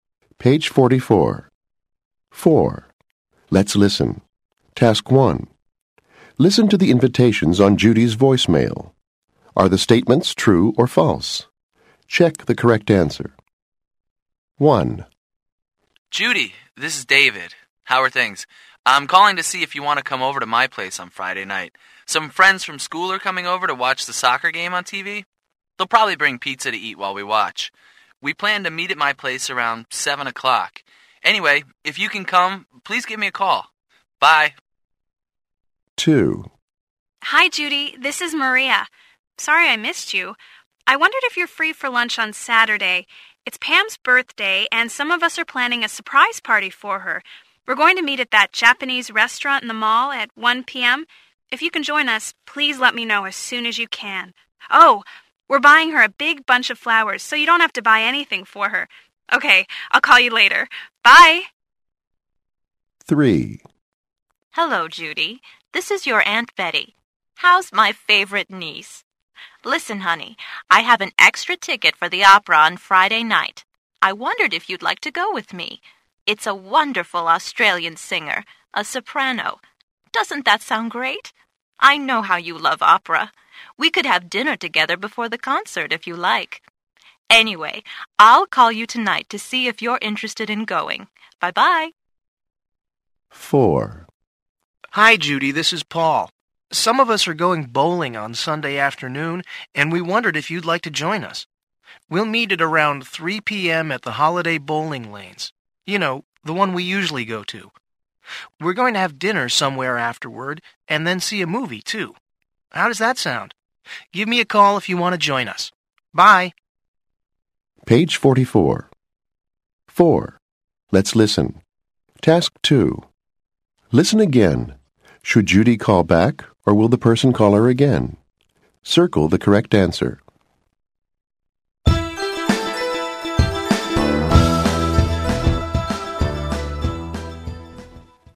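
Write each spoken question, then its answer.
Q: Should Judy call back, or will the person call her again?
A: Judy should call back (David)

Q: Should Judy call back, or will the person call her again?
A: Aunt Betty will call her again

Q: Should Judy call back, or will the person call her again?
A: Judy should call back (Paul)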